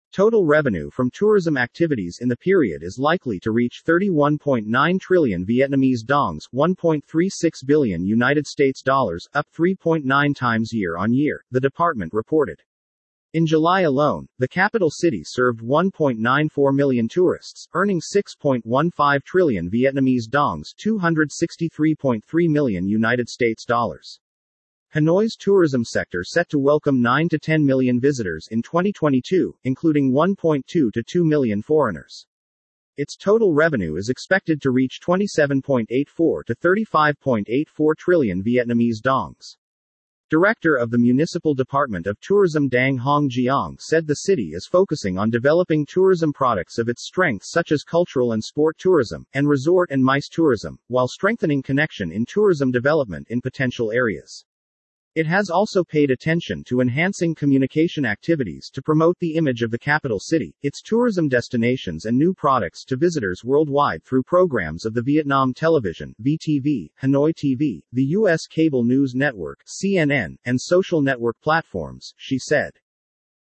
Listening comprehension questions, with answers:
Điền vào chỗ trống (nhiều hơn 1 từ)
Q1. Total revenue from __ activities in the period is likely to reach 31.9 trillion VND (1.36 billion USD),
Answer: tourism

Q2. up __ times year-on-year, the department reported.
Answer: 3.9

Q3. In July alone, the capital city served 1.94 million tourists, earning __ trillion VND (263.3 million USD).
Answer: 6.15

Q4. Hanoi's tourism sector set to welcome 9-10 million __ in 2022, including 1.2-2 million foreigners.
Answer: visitors

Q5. Its total __is expected to reach 27.84 to 35.84 trillion VND.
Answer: revenue

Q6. It has also paid attention to enhancing __ activities to promote the image of the capital city,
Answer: communication

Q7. its tourism __ and new products to visitors worldwide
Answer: destinations

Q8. and social network __, she said.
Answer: platforms